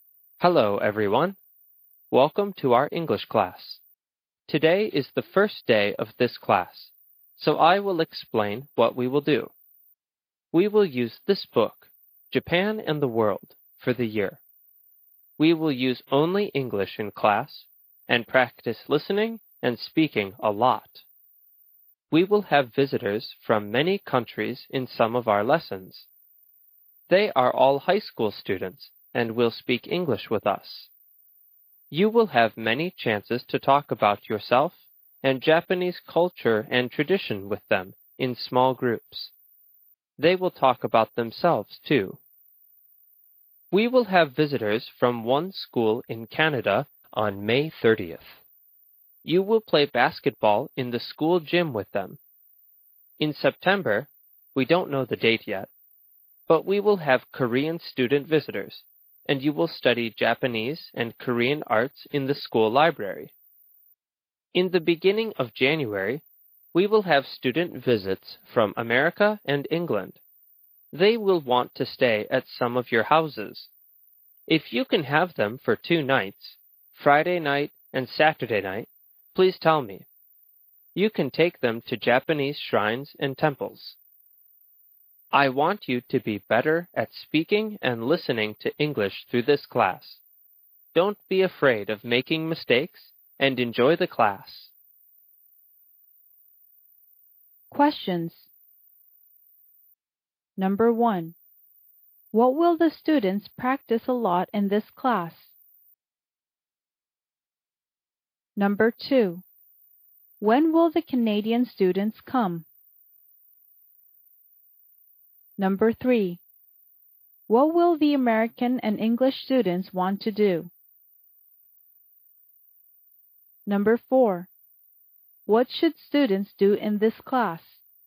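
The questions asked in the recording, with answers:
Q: What will the students practice a lot in this class?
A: Listening and speaking

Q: When will the Canadian students come?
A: On May 30th

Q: What will the American and English students want to do?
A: Stay at some of the students' houses

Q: What should students do in this class?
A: Not be afraid of making mistakes and enjoy the class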